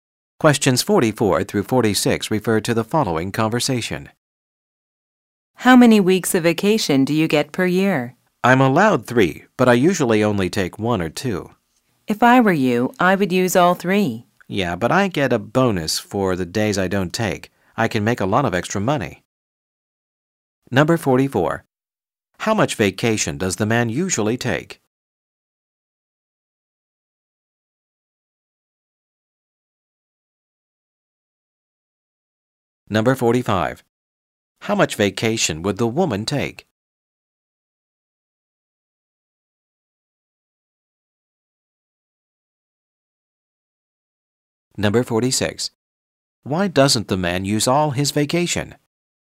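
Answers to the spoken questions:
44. 1 or 2 weeks
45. All 3 weeks
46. He gets a bonus for days not taken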